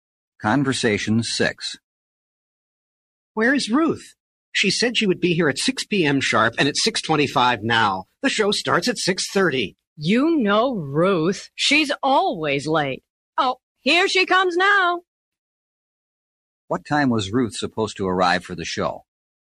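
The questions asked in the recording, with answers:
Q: What time was Ruth supposed to arrive for the show?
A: At 6 p.m. sharp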